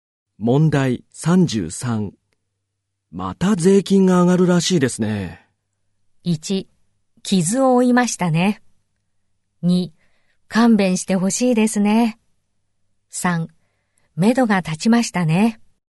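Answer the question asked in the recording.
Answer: 2: 勘弁してほしいですね。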